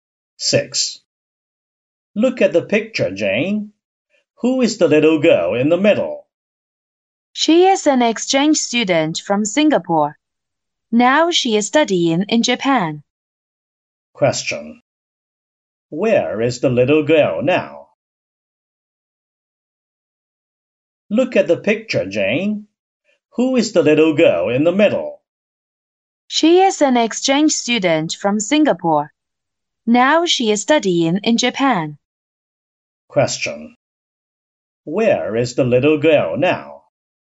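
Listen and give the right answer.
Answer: In Japan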